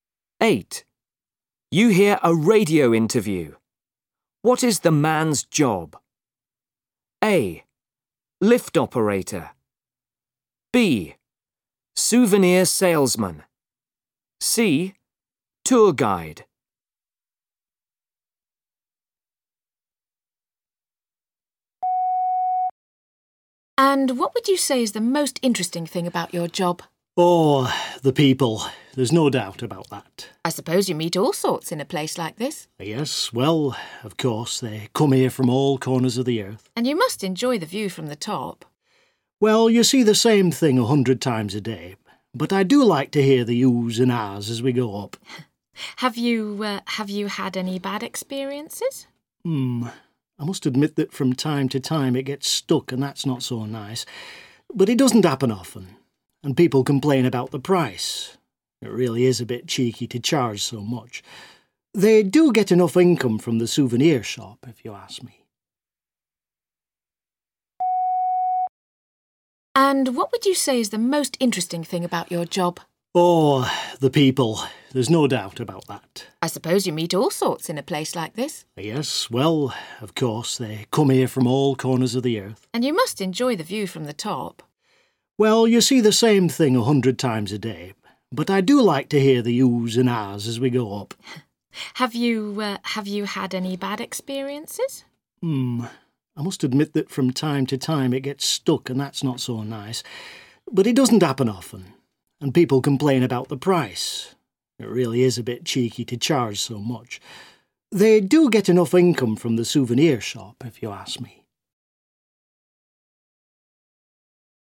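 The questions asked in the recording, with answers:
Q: What is the man's job?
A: A: Lift operator.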